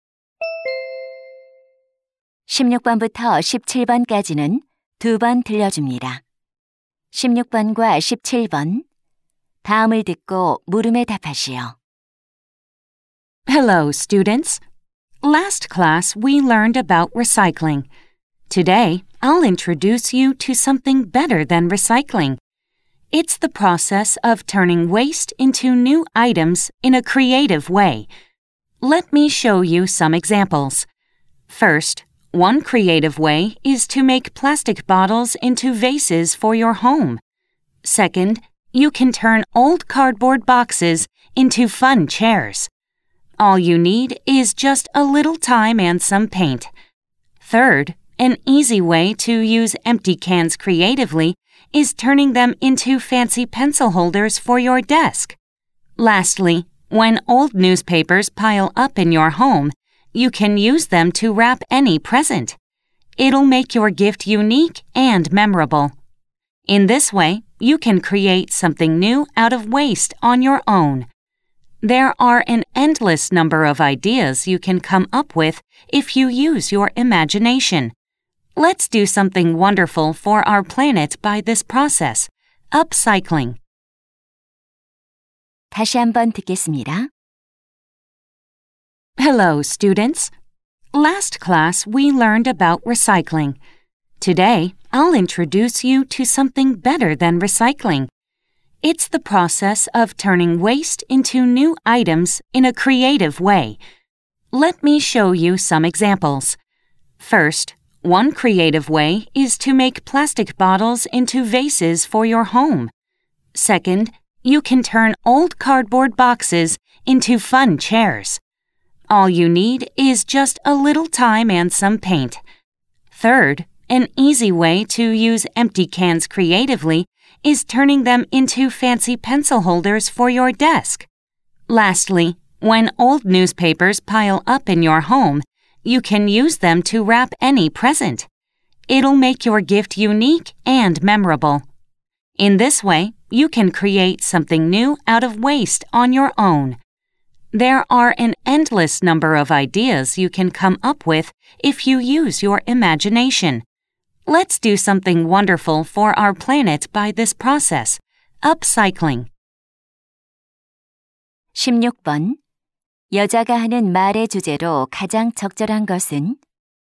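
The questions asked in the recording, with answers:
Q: 여자가 하는 말의 주제로 가장 적절한 것은?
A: 폐품을 창의적으로 재활용하는(업사이클링) 방법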